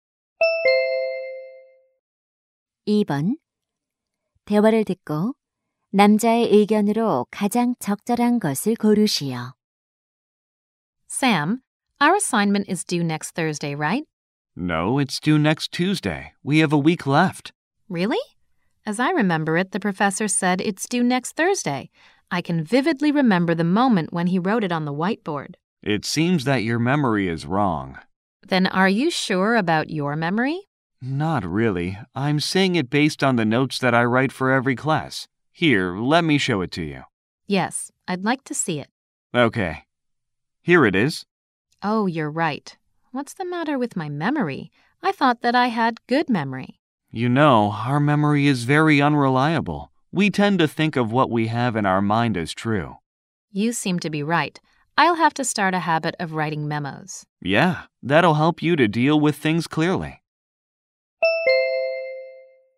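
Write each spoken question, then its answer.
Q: 대화를 듣고 남자의 의견으로 가장 적절한 것을 고르시오.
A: 사람의 기억은 믿을 수 없으므로 메모하는 습관이 도움이 된다.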